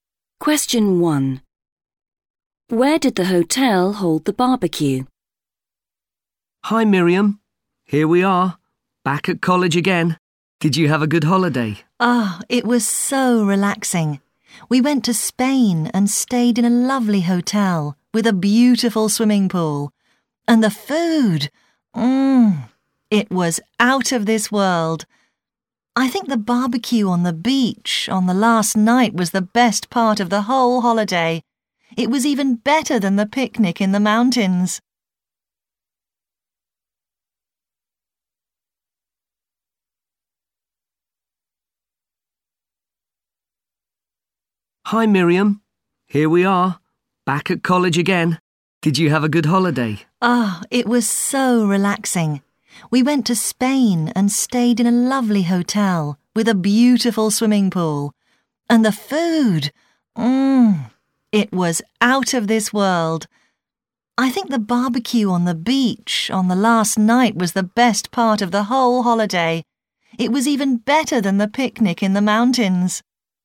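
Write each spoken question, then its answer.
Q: Where did the hotel hold the barbecue?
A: on the beach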